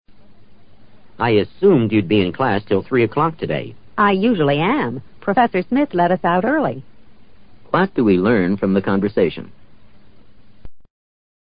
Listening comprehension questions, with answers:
What do we learn from the conversation?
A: The woman's class was allowed to leave ahead of time.

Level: 世博高级听说